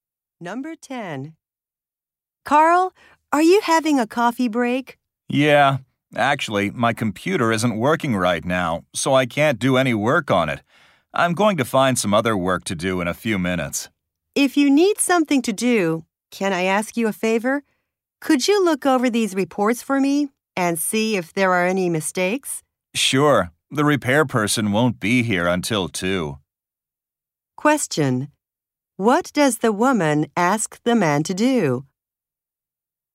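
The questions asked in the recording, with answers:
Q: What does the woman ask the man to do?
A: Check her reports for mistakes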